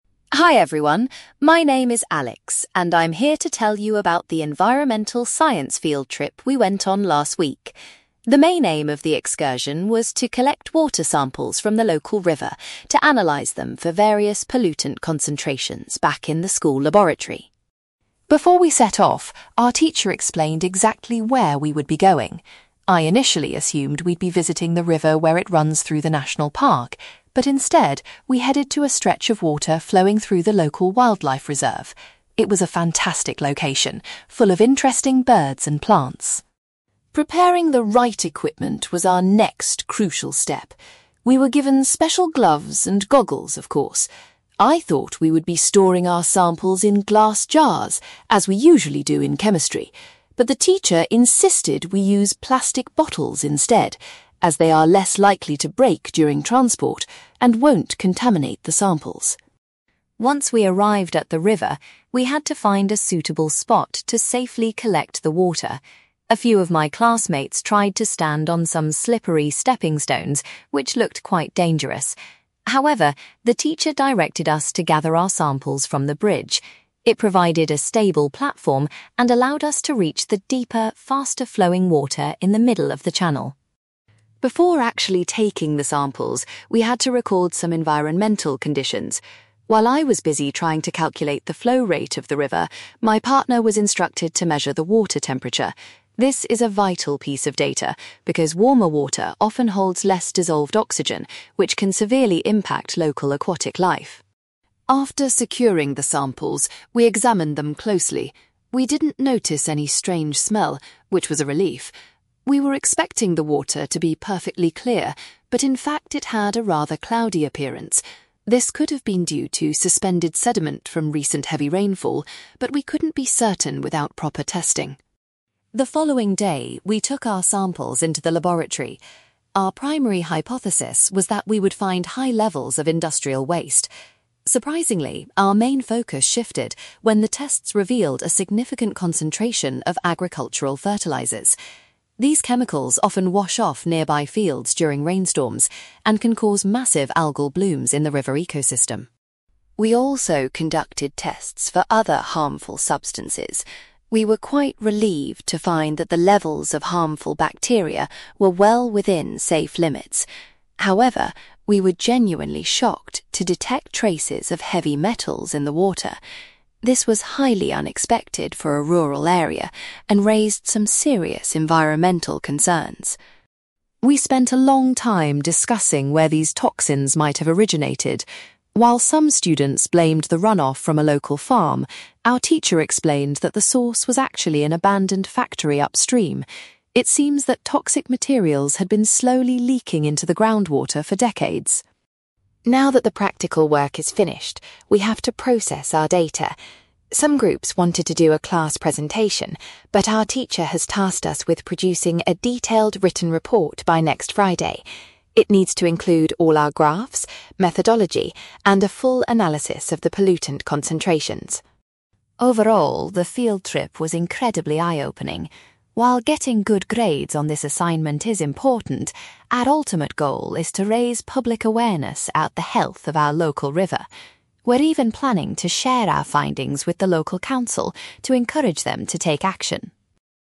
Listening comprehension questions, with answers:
You will hear a student called Alex giving a presentation about a science field trip to a local river. For questions 9-18, complete the sentences with a word or short phrase.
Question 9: Alex was surprised that the river sampling took place in a (9)........................... rather than a national park.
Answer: wildlife reserve

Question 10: Alex's teacher explicitly requested that students bring their water samples back in (10)........................... to avoid breakages.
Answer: plastic bottles

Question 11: The students were told to collect their water from a (11)........................... because it was safer than standing on slippery rocks.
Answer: bridge

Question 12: Before taking the water samples, Alex's partner was responsible for recording the (12)........................... of the river.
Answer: water temperature

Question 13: Alex noticed that the water had a (13)........................... when they first examined it at the riverbank.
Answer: cloudy appearance

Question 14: The laboratory tests showed that the water contained unexpected amounts of (14)........................... from nearby fields.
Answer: agricultural fertilizers

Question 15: Alex was particularly alarmed to discover the presence of (15)........................... during the laboratory analysis.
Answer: heavy metals

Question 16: The teacher revealed that the pollution was primarily coming from an (16)........................... located further up the river.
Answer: abandoned factory

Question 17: The students are currently required to complete a (17)........................... based on their data analysis.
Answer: written report

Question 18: Alex hopes that the project will ultimately help to increase (18)........................... regarding the condition of the river.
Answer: public awareness

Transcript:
Alex: Hi everyone, my name is Alex, and I'm here to tell you about the environmental science field trip we went on last week. The main aim of the excursion was to collect water samples from the local river to analyse them for various pollutant concentrations back in the school laboratory.
Before we set off, our teacher explained exactly where we would be going. I initially assumed we'd be visiting the river where it runs through the national park, but instead, we headed to a stretch of water flowing through the local wildlife reserve. It was a fantastic location, full of interesting birds and plants.
Preparing the right equipment was our next crucial step. We were given special gloves and goggles, of course. I thought we would be storing our samples in glass jars, as we usually do in chemistry, but the teacher insisted we use plastic bottles instead, as they are less likely to break during transport and won't contaminate the samples.
Once we arrived at the river, we had to find a suitable spot to safely collect the water. A few of my classmates tried to stand on some slippery stepping stones, which looked quite dangerous. However, the teacher directed us to gather our samples from the bridge. It provided a stable platform and allowed us to reach the deeper, faster-flowing water in the middle of the channel.
Before actually taking the samples, we had to record some environmental conditions. While I was busy trying to calculate the flow rate of the river, my partner was instructed to measure the water temperature. This is a vital piece of data because warmer water often holds less dissolved oxygen, which can severely impact local aquatic life.
After securing the samples, we examined them closely. We didn't notice any strange smell, which was a relief. We were expecting the water to be perfectly clear, but in fact, it had a rather cloudy appearance. This could have been due to suspended sediment from recent heavy rainfall, but we couldn't be certain without proper testing.
The following day, we took our samples into the laboratory. Our primary hypothesis was that we would find high levels of industrial waste. Surprisingly, our main focus shifted when the tests revealed a significant concentration of agricultural fertilizers. These chemicals often wash off nearby fields during rainstorms and can cause massive algal blooms in the river ecosystem.
We also conducted tests for other harmful substances. We were quite relieved to find that the levels of harmful bacteria were well within safe limits. However, we were genuinely shocked to detect traces of heavy metals in the water. This was highly unexpected for a rural area and raised some serious environmental concerns.
We spent a long time discussing where these toxins might have originated. While some students blamed the runoff from a local farm, our teacher explained that the source was actually an abandoned factory upstream. It seems that toxic materials had been slowly leaking into the groundwater for decades.
Now that the practical work is finished, we have to process our data. Some groups wanted to do a class presentation, but our teacher has tasked us with producing a detailed written report by next Friday. It needs to include all our graphs, methodology, and a full analysis of the pollutant concentrations.
Overall, the field trip was incredibly eye-opening. While getting good grades on this assignment is important, our ultimate goal is to raise public awareness about the health of our local river. We're even planning to share our findings with the local council to encourage them to take action.

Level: B2